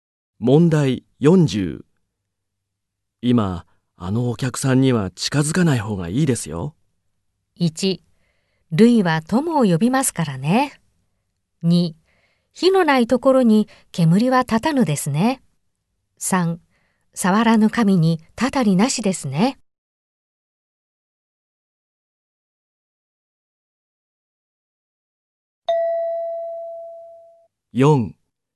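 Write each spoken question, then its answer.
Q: 今あのお客さんには近づかない方がいいですよ。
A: 3: 触らぬ神にたたりなしですね。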